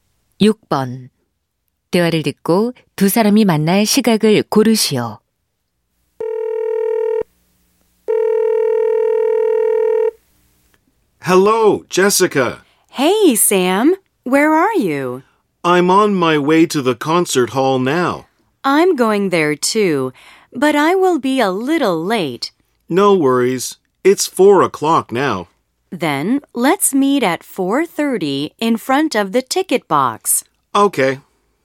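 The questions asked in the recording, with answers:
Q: 대화를 듣고 두 사람이 만날 시각을 고르시오.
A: 4시 30분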